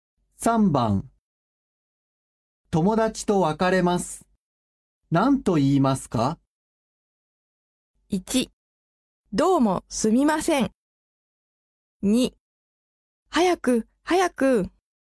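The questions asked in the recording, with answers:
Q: 友達と別れます。何と言いますか?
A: 3: じゃあまたね。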